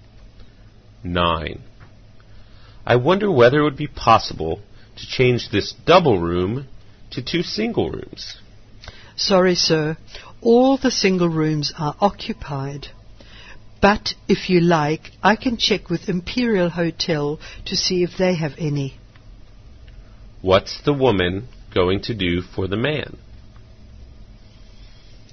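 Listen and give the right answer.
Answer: Check with Imperial Hotel for single rooms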